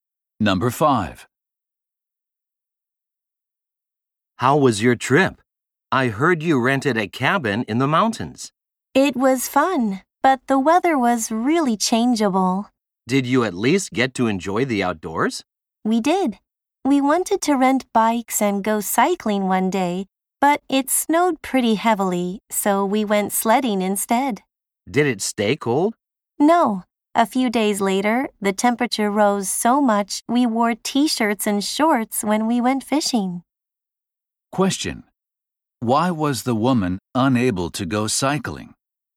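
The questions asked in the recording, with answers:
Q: Why was the woman unable to go cycling?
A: It snowed heavily.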